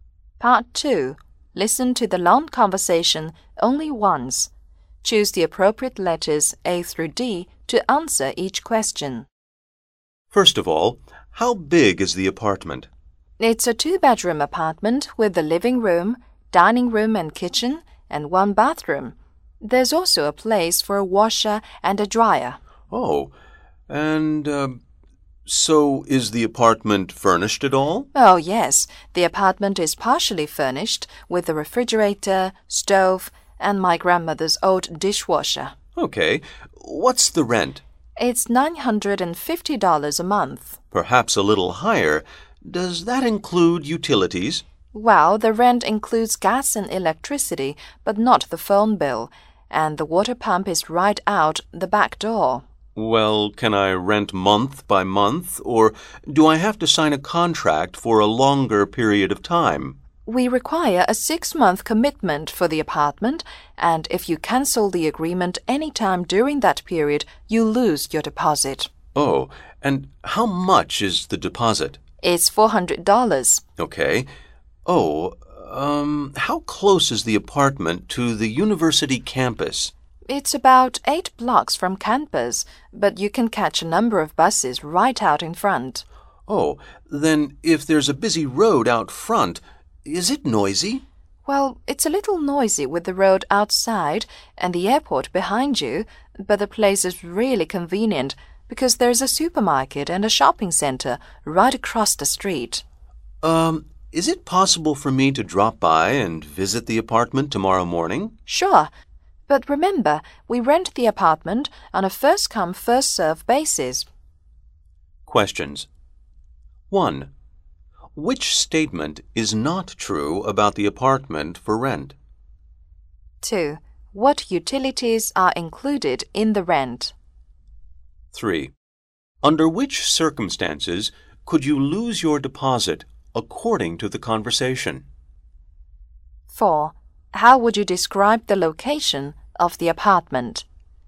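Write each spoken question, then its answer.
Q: What utilities are included in the rent?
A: Gas and electricity

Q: Under which circumstances could you lose your deposit according to the conversation?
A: If you cancel the agreement during the 6-month period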